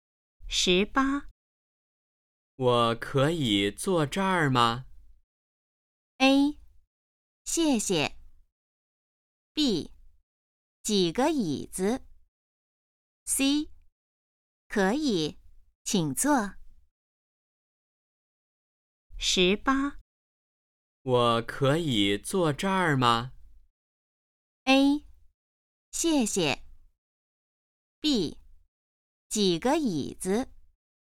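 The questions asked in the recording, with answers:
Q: 我可以坐这儿吗?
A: C: 可以,请坐。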